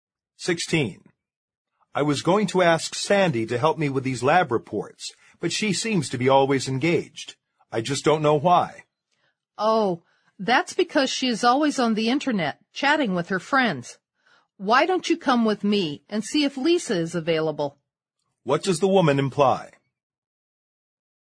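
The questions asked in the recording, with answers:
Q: What does the woman imply?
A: Sandy is too busy chatting online to help; they should ask Lisa instead.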